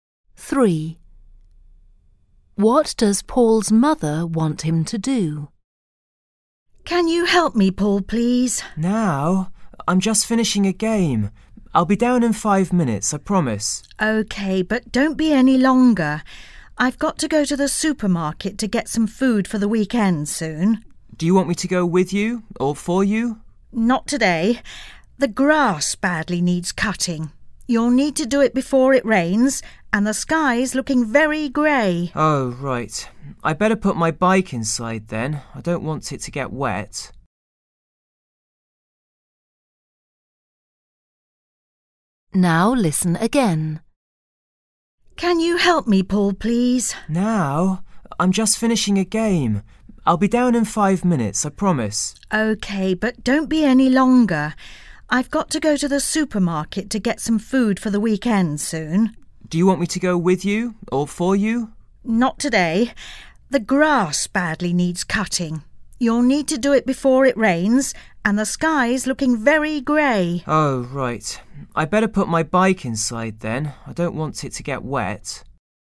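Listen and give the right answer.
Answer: Cut the grass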